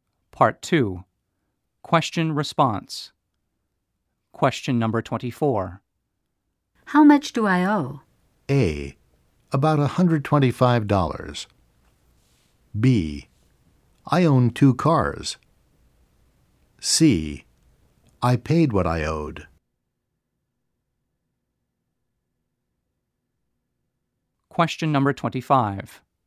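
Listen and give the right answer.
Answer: A: About $125.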